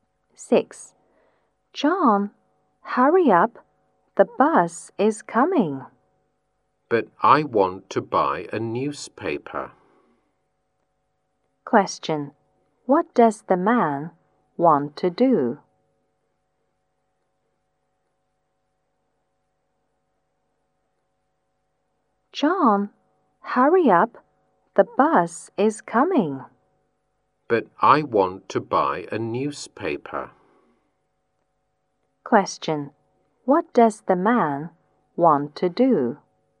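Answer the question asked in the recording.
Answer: Buy a newspaper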